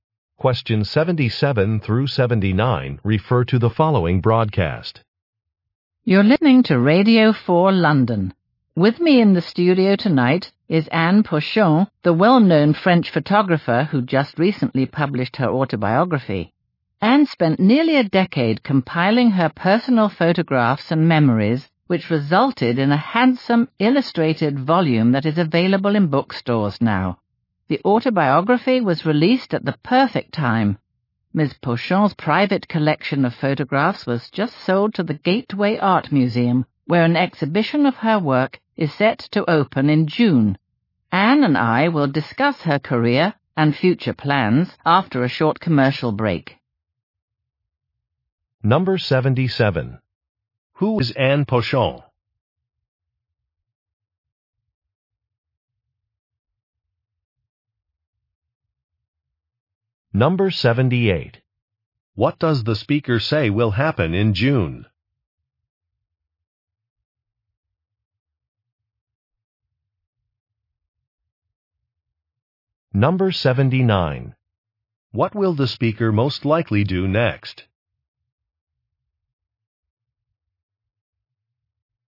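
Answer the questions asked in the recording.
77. A photographer
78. An exhibition of her work will open
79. Play a commercial break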